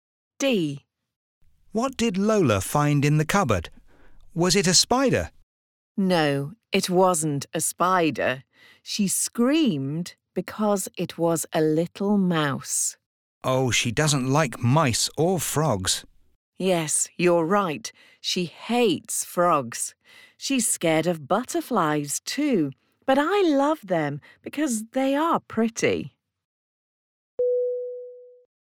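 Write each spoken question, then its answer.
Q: What did Lola find in the cupboard?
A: A little mouse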